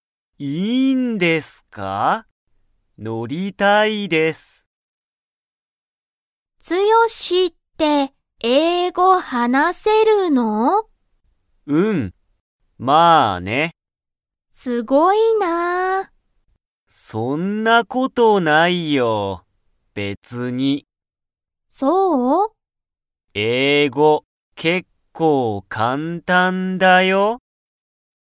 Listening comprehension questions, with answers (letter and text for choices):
ツヨシは英語(えいご)を話(はな)せますか?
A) はい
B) いいえ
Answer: A) はい

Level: Level 1